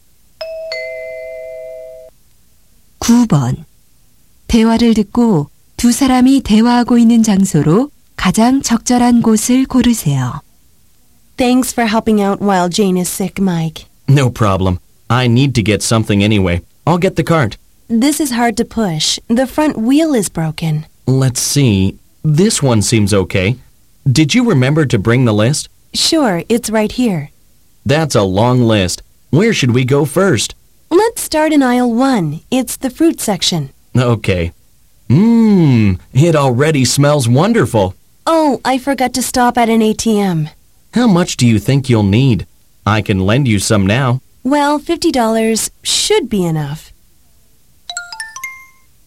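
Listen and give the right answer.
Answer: 슈퍼마켓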